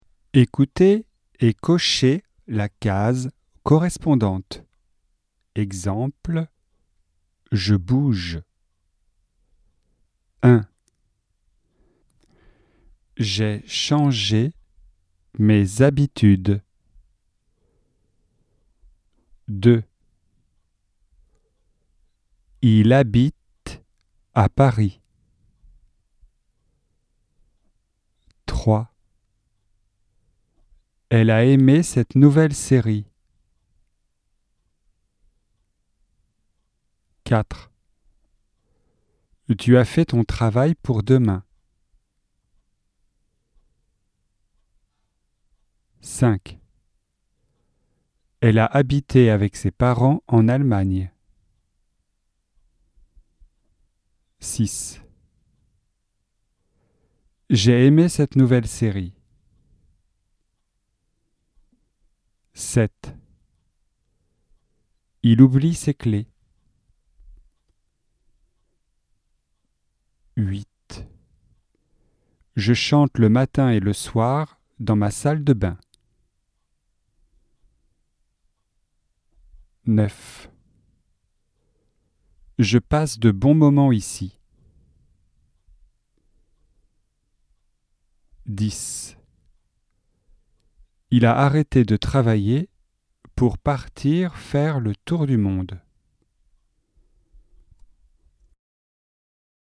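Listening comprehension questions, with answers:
Écoutez et cochez la case correspondante.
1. J'ai changé mes habitudes.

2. Il habite à Paris.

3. Elle a aimé cette nouvelle série.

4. Tu as fait ton travail pour demain.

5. Elle a habité avec ses parents en Allemagne.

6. J'ai aimé cette nouvelle série.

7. Il oublie ses clés.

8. Je chante le matin et le soir dans ma salle de bains.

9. Je passe de bons moments ici.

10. Il a arrêté de travailler pour partir faire le tour du monde.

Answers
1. passé
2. présent
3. passé
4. passé
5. passé
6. passé
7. présent
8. présent
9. présent
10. passé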